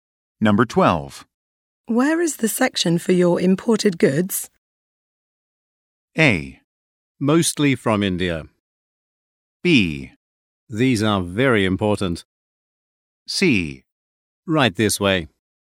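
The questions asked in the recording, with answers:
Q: Where is the section for your imported goods?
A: C: Right this way.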